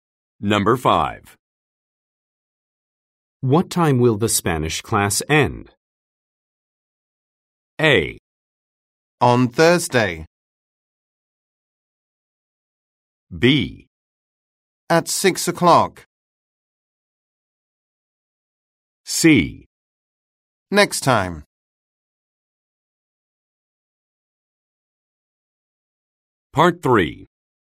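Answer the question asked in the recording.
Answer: B: At 6 o'clock.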